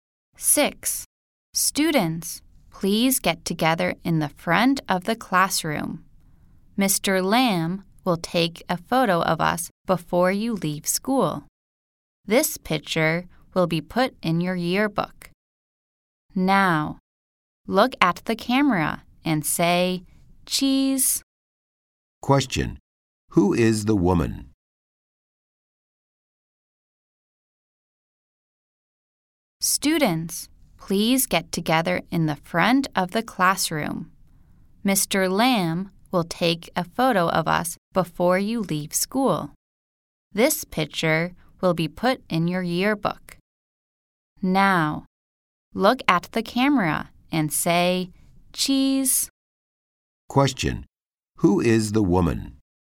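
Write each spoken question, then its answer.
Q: Who is the woman?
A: A teacher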